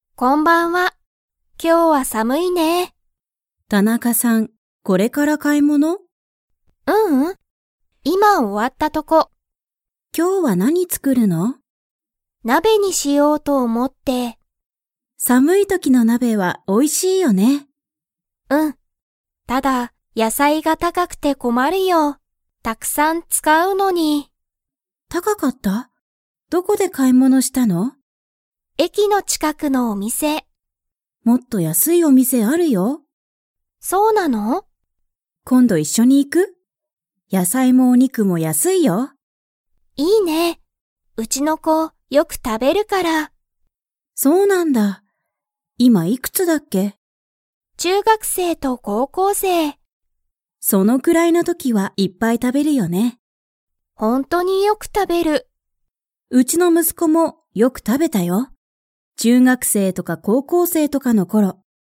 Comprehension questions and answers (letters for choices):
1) 田中たなかさんは今日きょう、何なにを作つくりますか?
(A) 買かい物もの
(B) 鍋なべ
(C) 野菜やさい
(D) お肉にく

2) 田中たなかさんの息子むすこは 。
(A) よく食たべる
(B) あまり食たべない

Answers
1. B
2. A

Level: Level 4